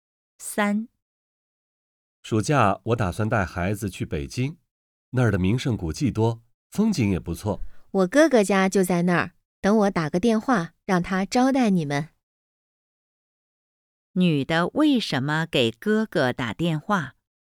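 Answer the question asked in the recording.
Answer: 让哥哥招待他们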